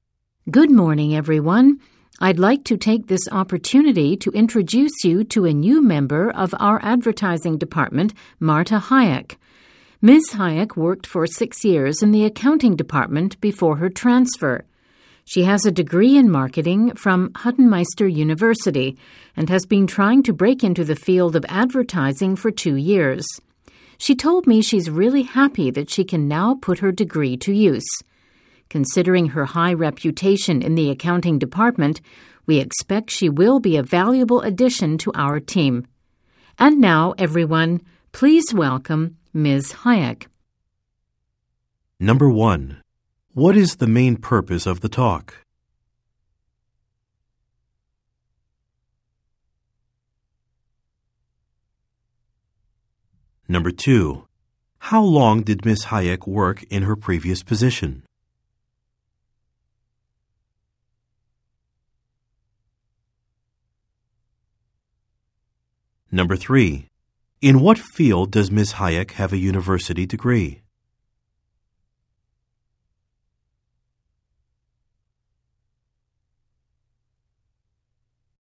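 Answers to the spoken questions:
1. To introduce a new member of the advertising department
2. 6 years
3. Marketing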